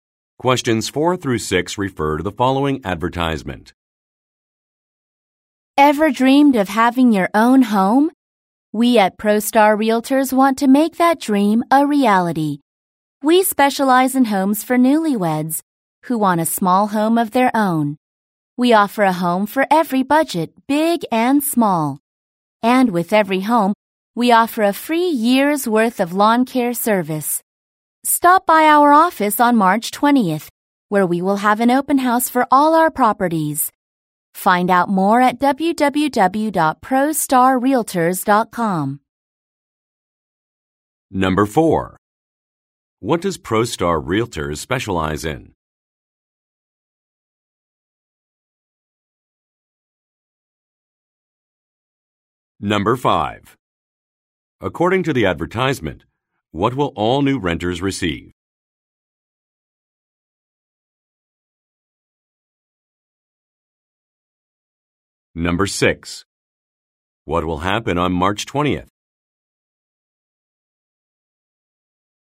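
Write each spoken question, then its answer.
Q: What does ProStar Realtors specialize in?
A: Small homes for newlyweds

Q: According to the advertisement, what will all new renters receive?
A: A free year of lawn care service

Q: What will happen on March 20th?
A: An open house for all properties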